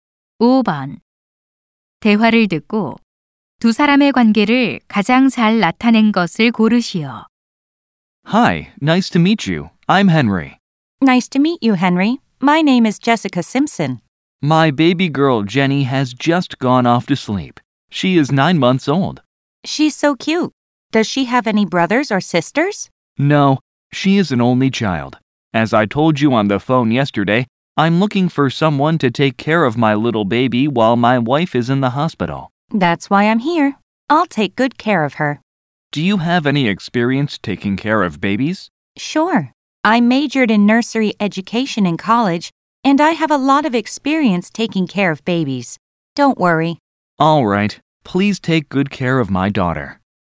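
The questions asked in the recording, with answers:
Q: 대화를 듣고 두 사람의 관계를 가장 잘 나타낸 것을 고르시오.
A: 아기 아버지와 베이비시터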